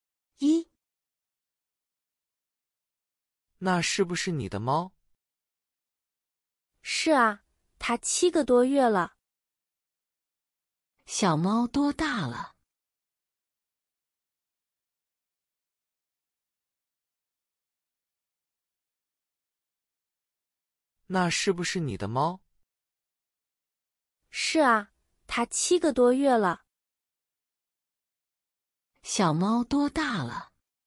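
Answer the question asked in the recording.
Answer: 七个多月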